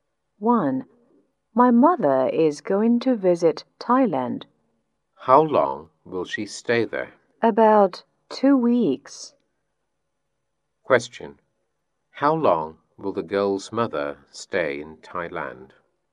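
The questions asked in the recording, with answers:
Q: Question. How long will the girl's mother stay in Thailand?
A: About 2 weeks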